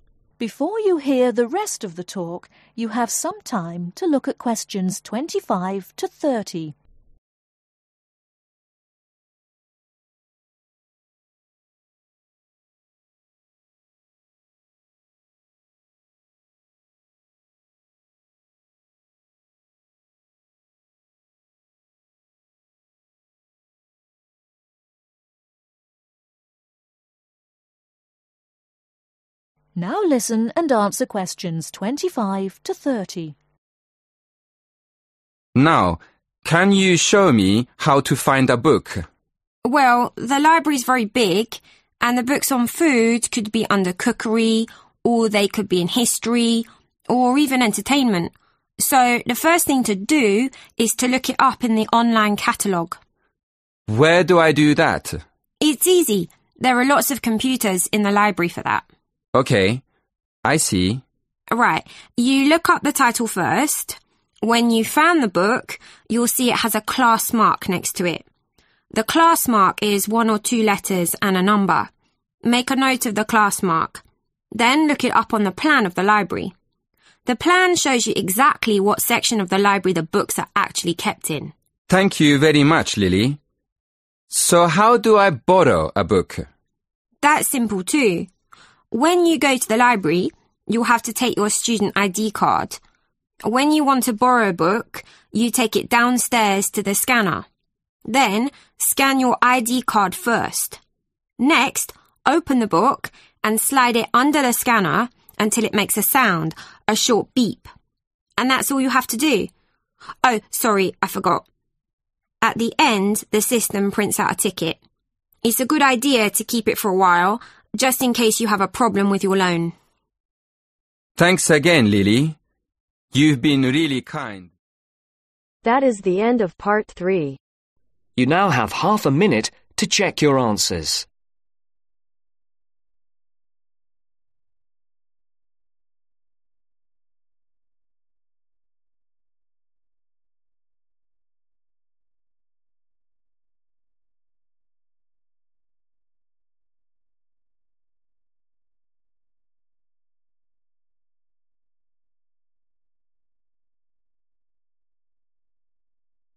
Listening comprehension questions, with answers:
Complete the sentences. Write NO MORE THAN TWO WORDS for each answer.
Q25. First look up the title in the ............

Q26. The class marks in one or two letters and ............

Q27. The ............ shows you where to look for the books.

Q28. What do you need to scan first ?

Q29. What does the scanner do when you scan a book ?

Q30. What does the system do at the end ?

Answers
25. Online catalogue
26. a number
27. Plan
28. (student) ID card
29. makes a beep/sound/beeps
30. Prints a ticket